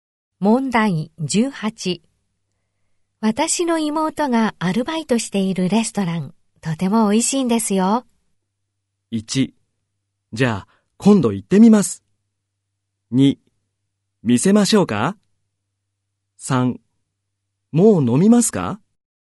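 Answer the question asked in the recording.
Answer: 1: じゃあ今度行ってみます。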